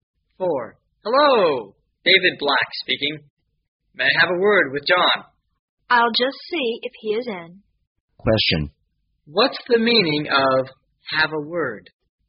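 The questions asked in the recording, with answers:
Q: What's the meaning of have a word?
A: To talk briefly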